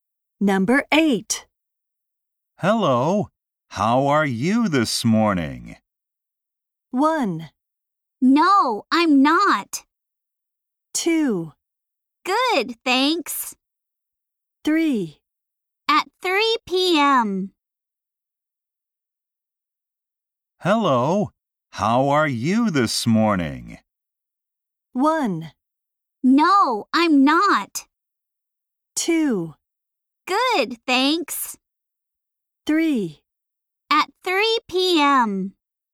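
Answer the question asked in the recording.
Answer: 2: Good, thanks.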